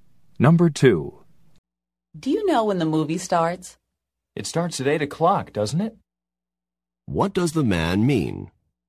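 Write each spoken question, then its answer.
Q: What does the man mean?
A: He thinks the movie starts at 8 o'clock.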